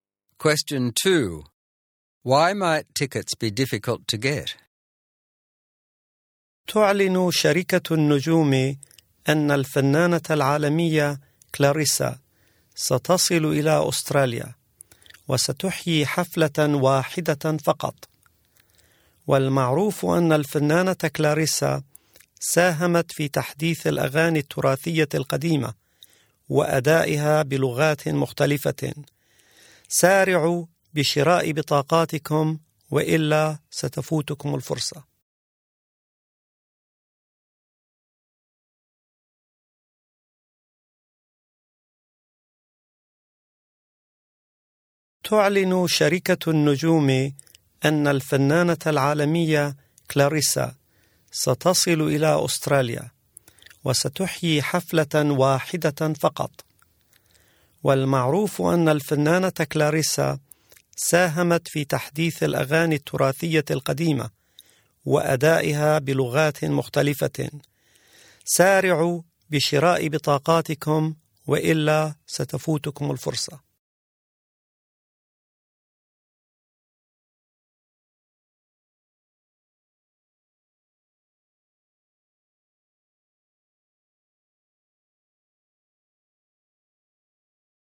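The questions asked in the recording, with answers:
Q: Why might tickets be difficult to get?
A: The singer Clarissa is giving only one concert in Australia.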